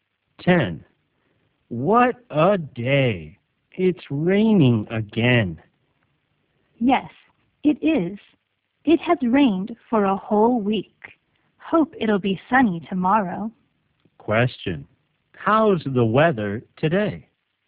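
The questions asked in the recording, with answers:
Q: How's the weather today?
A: Rainy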